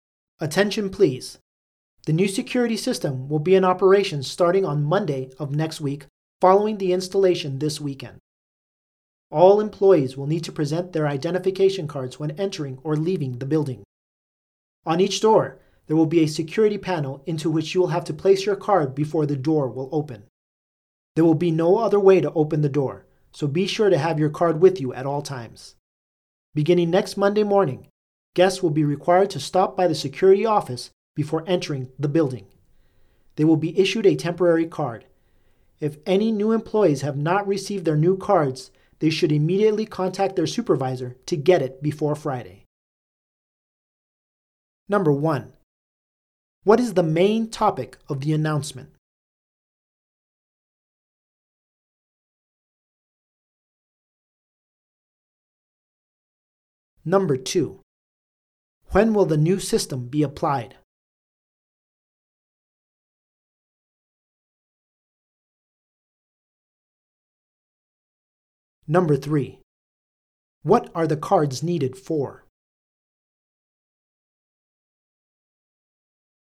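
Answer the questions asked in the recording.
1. The new security system
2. Starting next Monday
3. To enter or leave the building (to open the doors)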